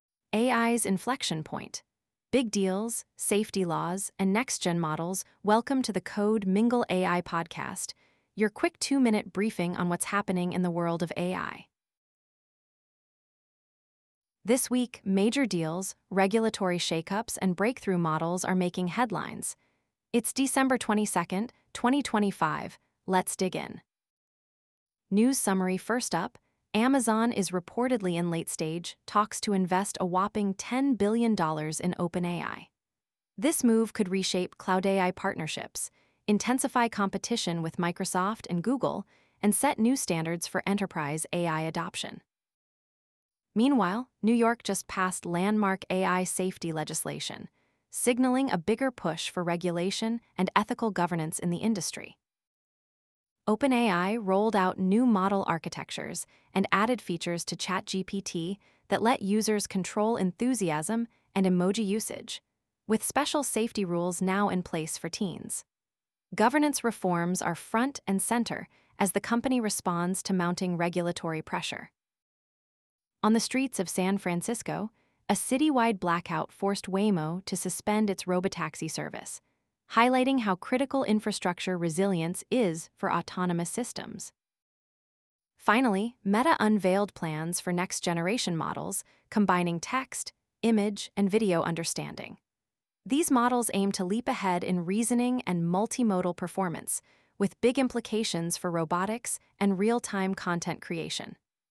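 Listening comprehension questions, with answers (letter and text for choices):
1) What is the reported value of Amazon's potential investment in OpenAI?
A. $1 billion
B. $5 billion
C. $10 billion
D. $20 billion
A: C. $10 billion

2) Which U.S. state recently passed landmark AI safety legislation?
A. California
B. Texas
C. New York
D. Florida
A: C. New York

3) What new feature did OpenAI add to ChatGPT to enhance user control?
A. Voice recognition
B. Control over enthusiasm and emoji usage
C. Offline mode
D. Automatic translation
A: B. Control over enthusiasm and emoji usage

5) What is one impact of Amazon's potential investment in OpenAI, if completed?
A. Decrease in cloud-AI competition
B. Slower AI adoption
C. Acceleration of AI adoption and cloud integration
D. Reduction in enterprise AI capabilities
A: C. Acceleration of AI adoption and cloud integration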